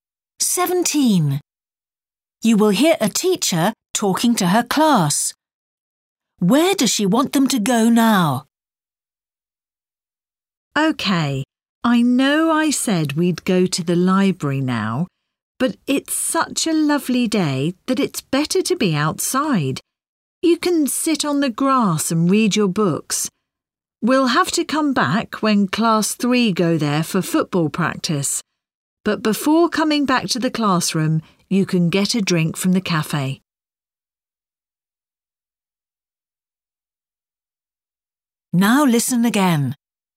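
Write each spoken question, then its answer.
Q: Where does she want them to go now?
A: Outside, to sit on the grass (the sports field)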